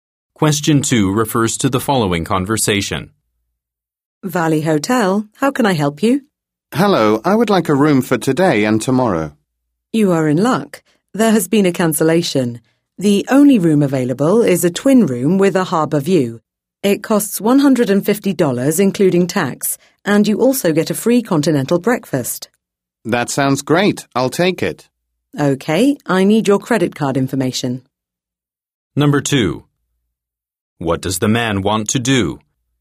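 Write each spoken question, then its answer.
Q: What does the man want to do?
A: Book a room for today and tomorrow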